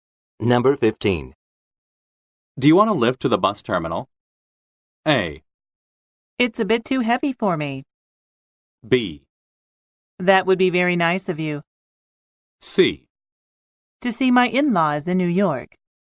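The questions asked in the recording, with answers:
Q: Do you want to lift to the bus terminal?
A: B: That would be very nice of you.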